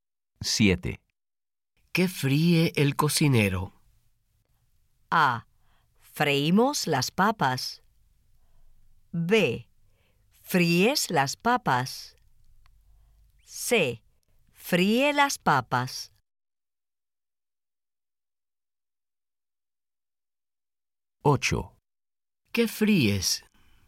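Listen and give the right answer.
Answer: C: Fríe las papas.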